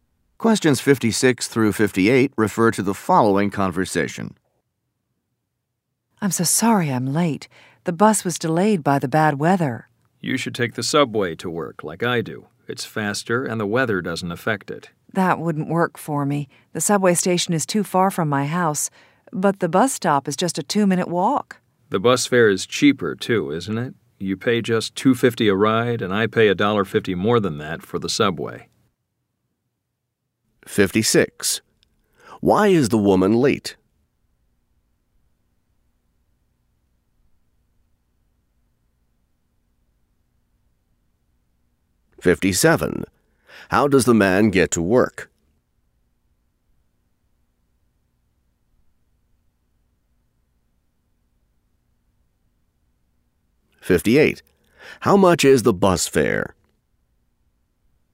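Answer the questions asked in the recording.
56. The bus was delayed by bad weather
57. By subway
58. $2.50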